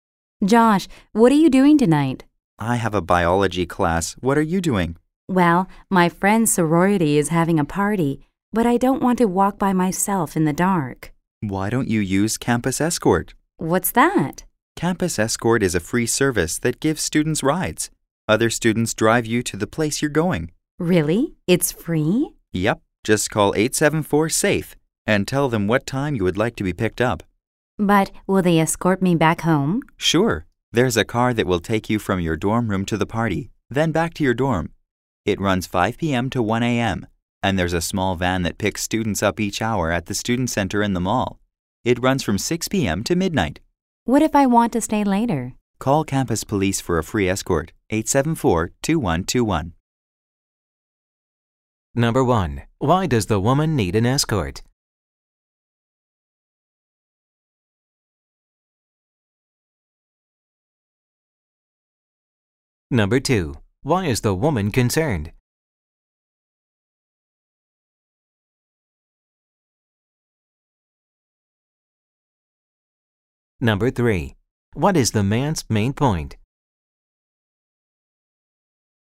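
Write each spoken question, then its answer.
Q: Why does the woman need an escort?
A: She wants to go to a sorority party but doesn't want to walk alone in the dark.

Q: What is the man's main point?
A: Campus Escort is a free service that gives students rides.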